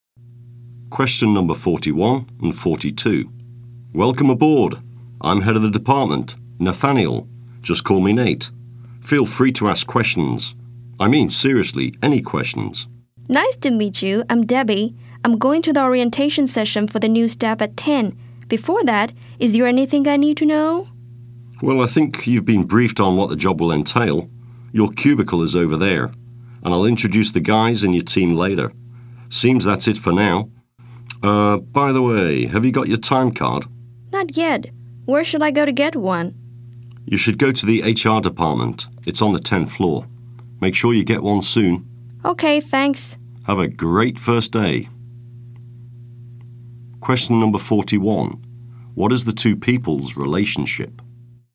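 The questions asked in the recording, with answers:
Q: What is the two people's relationship?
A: Department head and new employee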